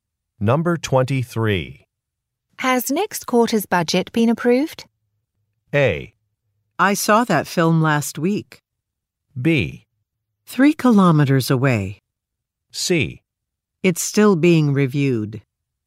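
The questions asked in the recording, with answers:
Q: Has next quarter's budget been approved?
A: C: It's still being reviewed.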